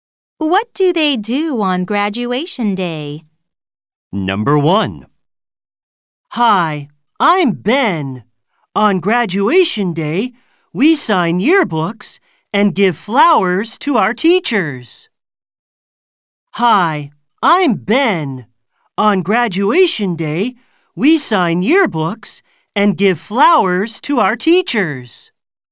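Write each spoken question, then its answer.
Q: What do they do on graduation day?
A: Ben: they sign yearbooks and give flowers to their teachers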